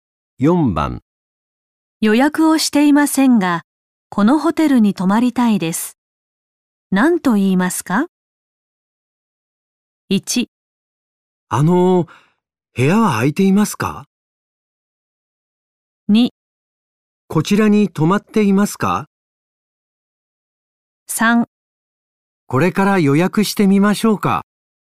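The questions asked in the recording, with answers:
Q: 予約をしていませんが、このホテルに泊まりたいです。何と言いますか?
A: 1: 部屋は空いていますか?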